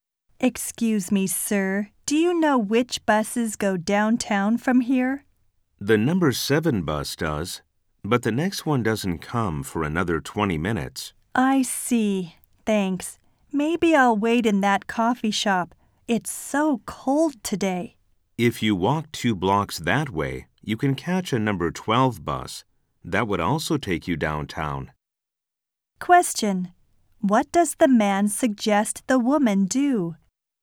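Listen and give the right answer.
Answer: Walk two blocks to catch a number 12 bus.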